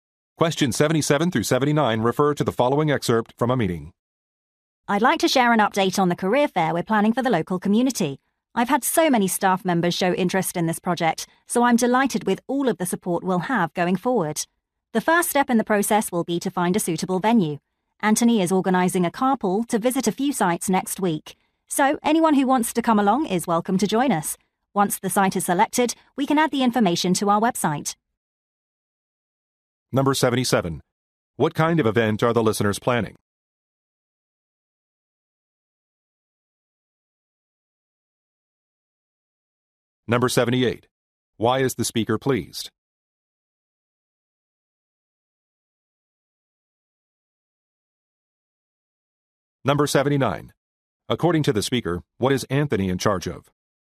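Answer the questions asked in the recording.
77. A career fair
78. Many staff members showed interest in the project
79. Organizing a carpool to visit sites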